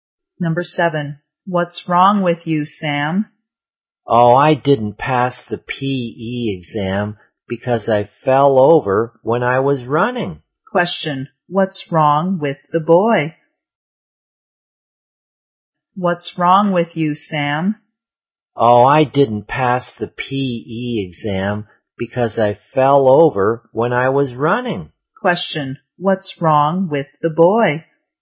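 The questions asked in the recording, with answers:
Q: what's wrong with the boy?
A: He didn't pass the PE exam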